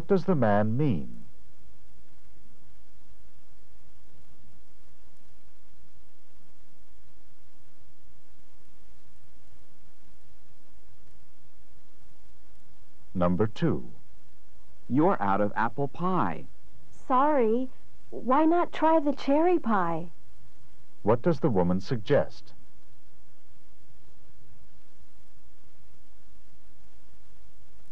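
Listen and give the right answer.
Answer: Trying the cherry pie.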